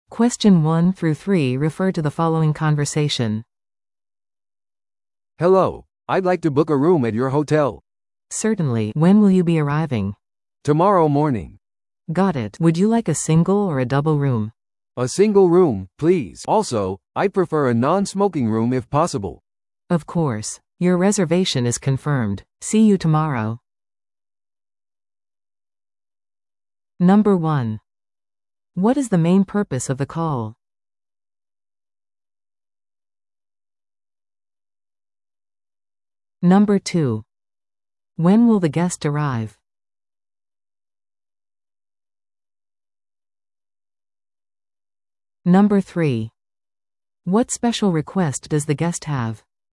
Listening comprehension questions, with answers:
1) What is the main purpose of the call?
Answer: ホテルの部屋を予約するため

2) When will the guest arrive?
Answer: 明日の朝

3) What special request does the guest have?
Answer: 禁煙ルーム